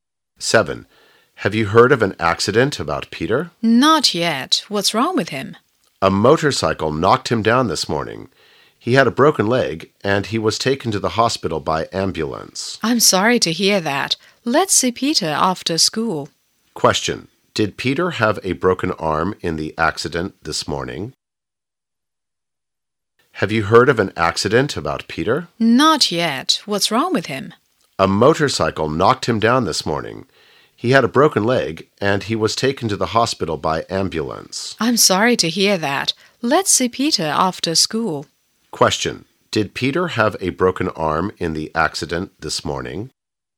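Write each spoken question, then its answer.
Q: Did Peter have a broken arm in the accident this morning?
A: No, he had a broken leg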